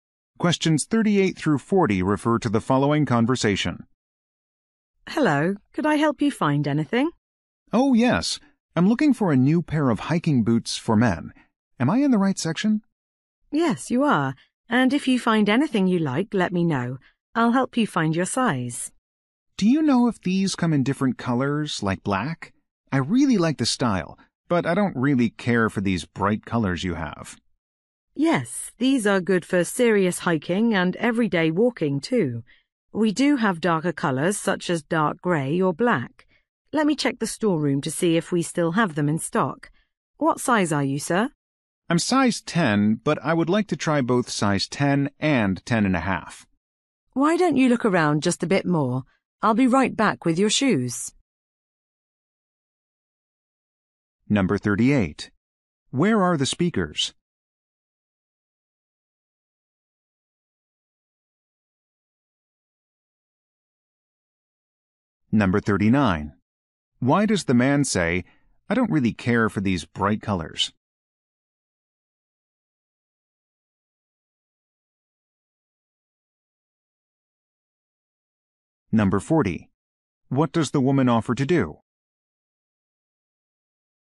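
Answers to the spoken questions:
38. In a shoe store
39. He wants a darker color, like black
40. Check the storeroom for the boots in stock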